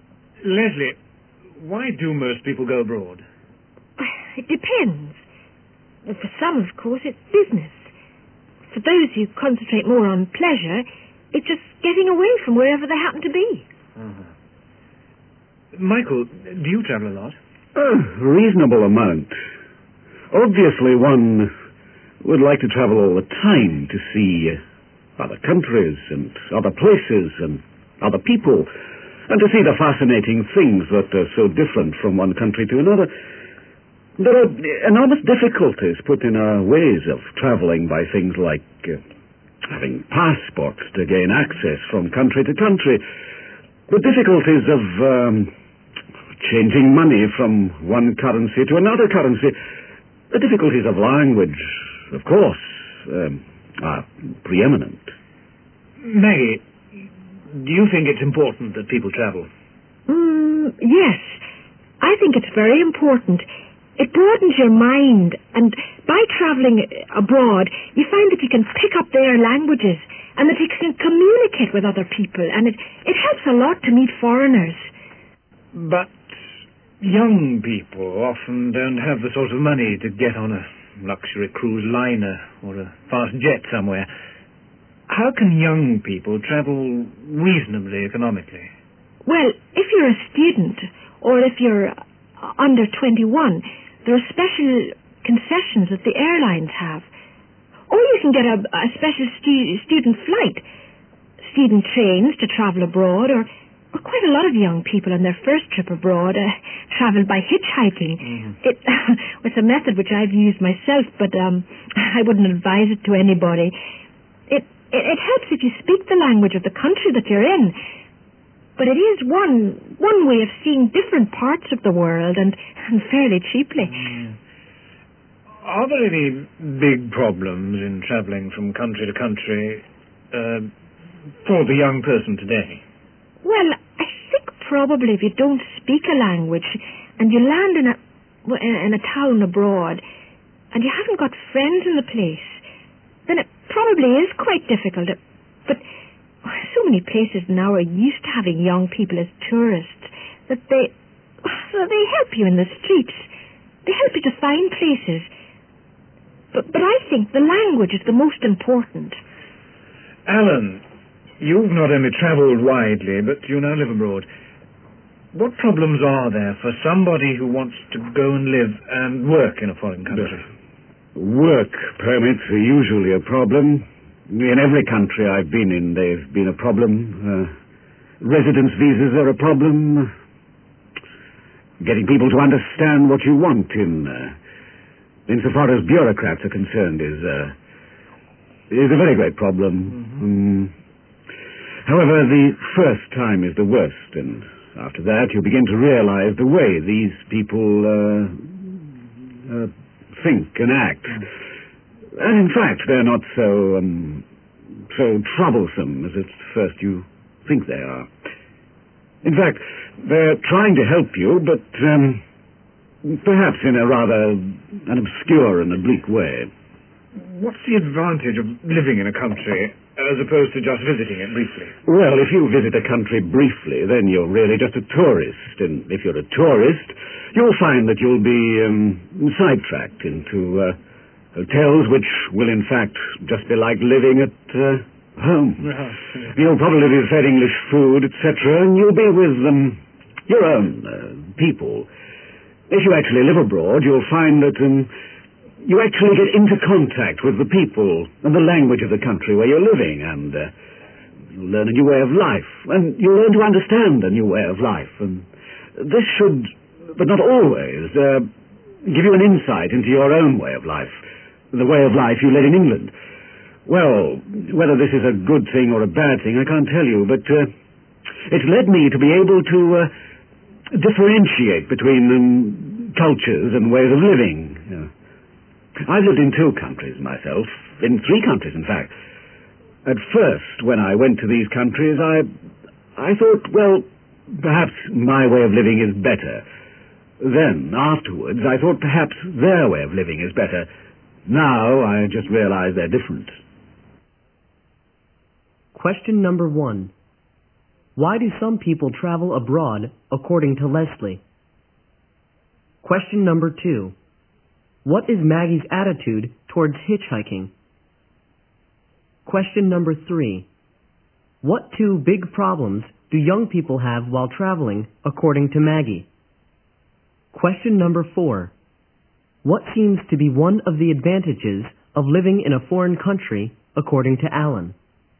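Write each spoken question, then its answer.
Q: Why do some people travel abroad, according to Leslie?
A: For business, or for pleasure, to get away from wherever they happen to be

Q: What is Maggie's attitude towards hitchhiking?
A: She has used it herself but wouldn't advise it to anybody

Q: What two big problems do young people have while traveling, according to Maggie?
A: Not speaking the language and having no friends in the place

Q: What seems to be one of the advantages of living in a foreign country, according to Alan?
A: You get in contact with the people and language and learn to understand a new way of life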